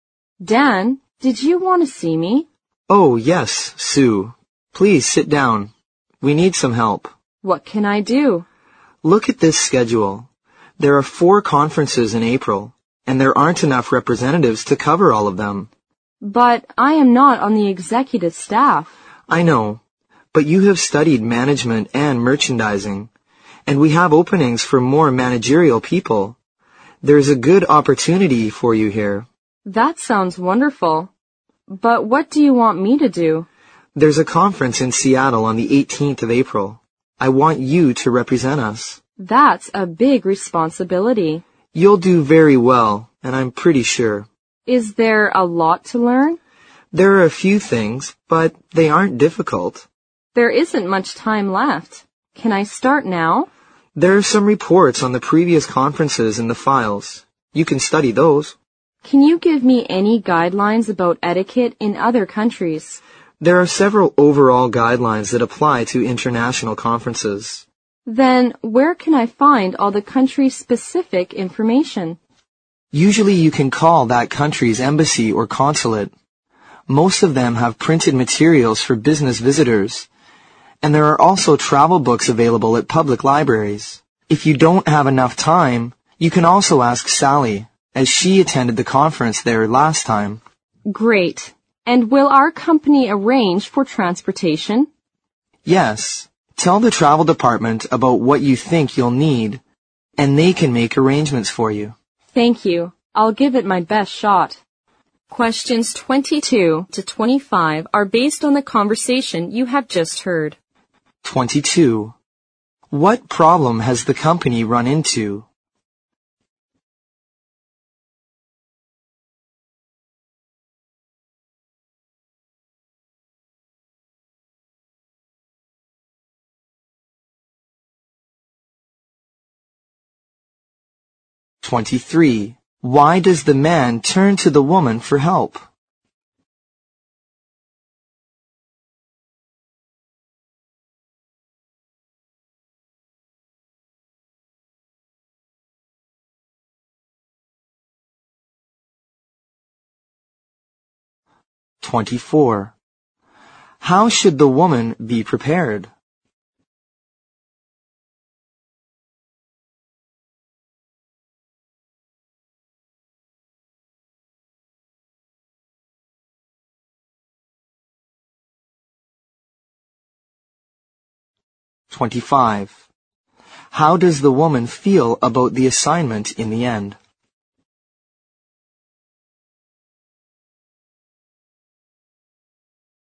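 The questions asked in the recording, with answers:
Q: What problem has the company run into?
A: There aren't enough representatives to cover all four conferences in April.

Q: Why does the man turn to the woman for help?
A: She has studied management and merchandising.

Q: How does the woman feel about the assignment in the end?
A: She is willing to do her best.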